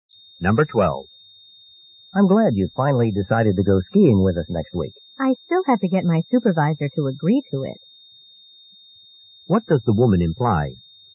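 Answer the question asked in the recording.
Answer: She may not go if her supervisor doesn't agree.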